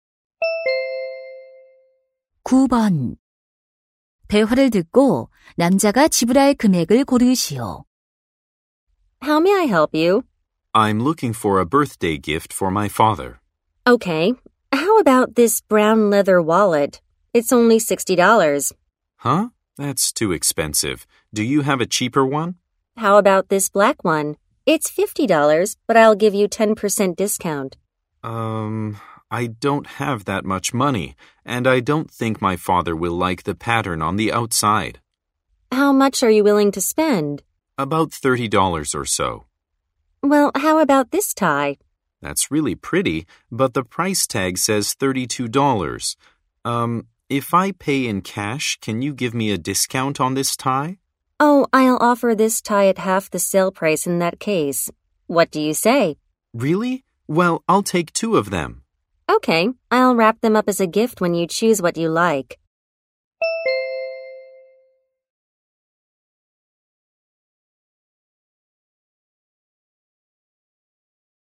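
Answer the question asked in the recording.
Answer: $32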